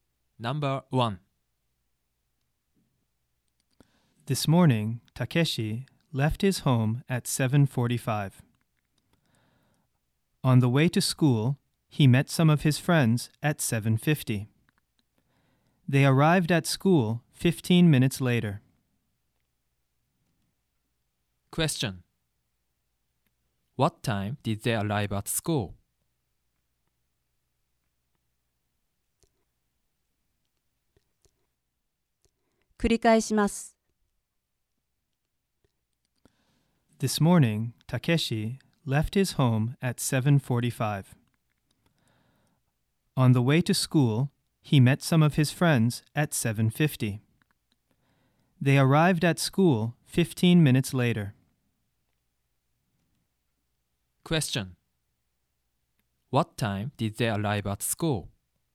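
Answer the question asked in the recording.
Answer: At 8:05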